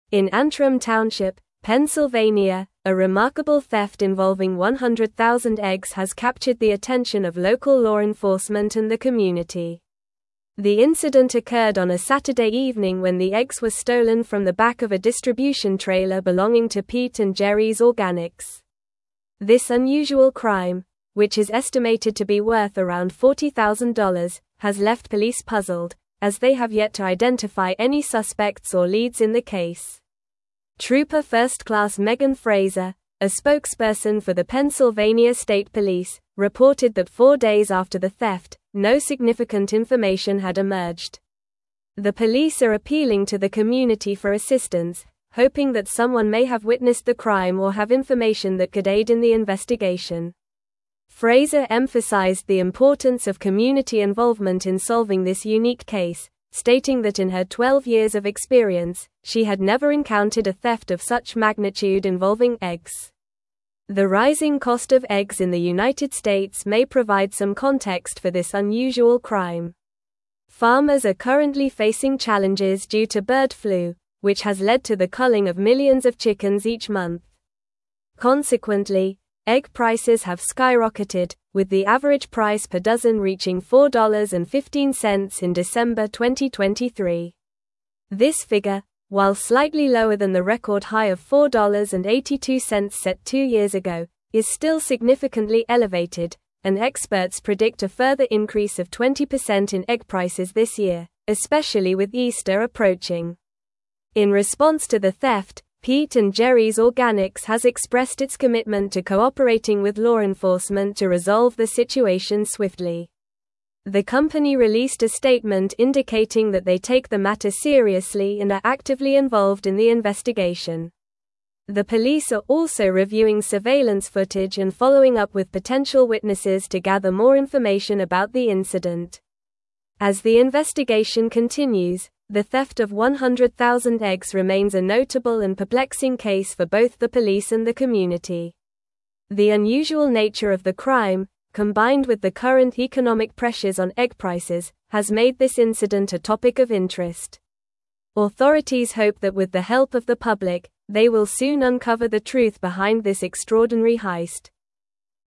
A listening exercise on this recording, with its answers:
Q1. In Antrim Township, Pennsylvania, a remarkable theft involving 100,000 eggs has captured the attention of local law enforcement and the (1)______.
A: community

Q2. The incident occurred on a Saturday evening when the eggs were stolen from the back of a distribution (2)______ belonging to Pete & Gerry's Organics.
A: trailer

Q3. This unusual crime, which is estimated to be worth around $40,000, has left police (3)______, as they have yet to identify any suspects or leads in the case.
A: puzzled

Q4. Trooper First Class Megan Frazer, a (4)______ for the Pennsylvania State Police, reported that four days after the theft, no significant information had emerged.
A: spokesperson

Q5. The (5)______ are appealing to the community for assistance, hoping that someone may have (6)______ the crime or have information that could aid in the investigation.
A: police

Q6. The (5)______ are appealing to the community for assistance, hoping that someone may have (6)______ the crime or have information that could aid in the investigation.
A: witnessed

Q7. Frazer (7)______ the importance of community involvement in solving this unique case, stating that in her twelve years of experience, she had never encountered a theft of such magnitude (8)______ eggs.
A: emphasized

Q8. Frazer (7)______ the importance of community involvement in solving this unique case, stating that in her twelve years of experience, she had never encountered a theft of such magnitude (8)______ eggs.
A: involving

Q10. This figure, while slightly lower than the record high of $4.82 set two years ago, is still significantly elevated, and experts predict a further increase of 20% in egg prices this year, especially with (10)______ approaching.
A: Easter

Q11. In response to the theft, Pete & Gerry's (11)______ has expressed its commitment to cooperating with law enforcement to resolve the situation swiftly.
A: Organics

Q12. The company (12)______ a statement indicating that they take the matter seriously and are actively (13)______ in the investigation.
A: released

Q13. The company (12)______ a statement indicating that they take the matter seriously and are actively (13)______ in the investigation.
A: involved

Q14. The police are also reviewing surveillance footage and following up with (14)______ witnesses to gather more information about the incident.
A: potential

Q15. The (15)______ nature of the crime, combined with the current economic pressures on egg prices, has made this incident a topic of interest.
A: unusual

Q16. Authorities hope that with the help of the public, they will soon uncover the (16)______ behind this extraordinary heist.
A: truth

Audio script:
In Antrim Township, Pennsylvania, a remarkable theft involving 100,000 eggs has captured the attention of local law enforcement and the community. The incident occurred on a Saturday evening when the eggs were stolen from the back of a distribution trailer belonging to Pete & Gerry's Organics. This unusual crime, which is estimated to be worth around $40,000, has left police puzzled, as they have yet to identify any suspects or leads in the case.
Trooper First Class Megan Frazer, a spokesperson for the Pennsylvania State Police, reported that four days after the theft, no significant information had emerged. The police are appealing to the community for assistance, hoping that someone may have witnessed the crime or have information that could aid in the investigation. Frazer emphasized the importance of community involvement in solving this unique case, stating that in her twelve years of experience, she had never encountered a theft of such magnitude involving eggs.
The rising cost of eggs in the United States may provide some context for this unusual crime. Farmers are currently facing challenges due to bird flu, which has led to the culling of millions of chickens each month. Consequently, egg prices have skyrocketed, with the average price per dozen reaching $4.15 in December 2023. This figure, while slightly lower than the record high of $4.82 set two years ago, is still significantly elevated, and experts predict a further increase of 20% in egg prices this year, especially with Easter approaching.
In response to the theft, Pete & Gerry's Organics has expressed its commitment to cooperating with law enforcement to resolve the situation swiftly. The company released a statement indicating that they take the matter seriously and are actively involved in the investigation. The police are also reviewing surveillance footage and following up with potential witnesses to gather more information about the incident.
As the investigation continues, the theft of 100,000 eggs remains a notable and perplexing case for both the police and the community. The unusual nature of the crime, combined with the current economic pressures on egg prices, has made this incident a topic of interest. Authorities hope that with the help of the public, they will soon uncover the truth behind this extraordinary heist.

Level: Level 4